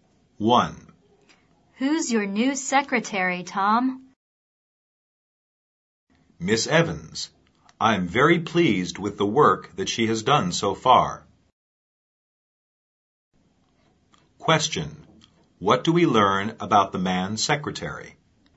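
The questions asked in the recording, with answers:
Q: What do we learn about the man secretary?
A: She does her work well; he is pleased with her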